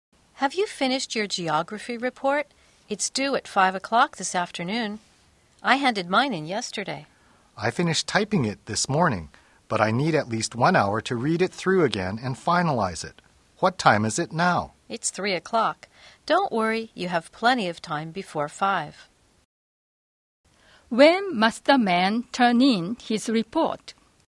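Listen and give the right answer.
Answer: By 5 o'clock this afternoon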